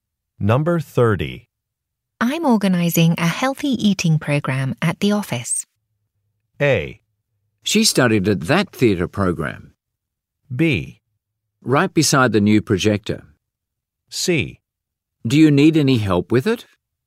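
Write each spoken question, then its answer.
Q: I'm organizing a healthy eating program at the office.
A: C: Do you need any help with it?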